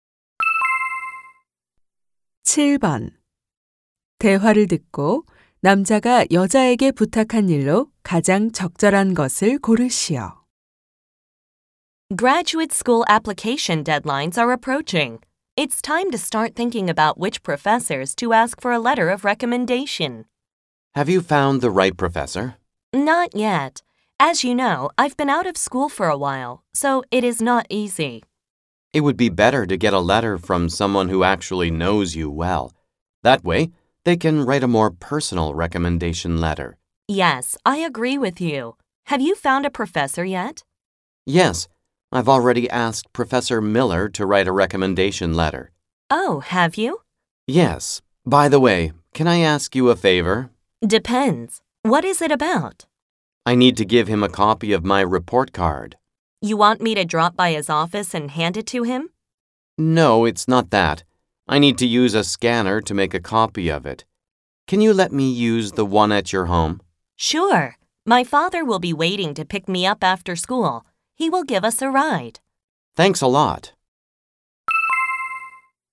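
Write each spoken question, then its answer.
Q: 대화를 듣고 남자가 여자에게 부탁한 일로 가장 적절한 것을 고르시오.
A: 여자의 집 스캐너를 쓰게 해 주기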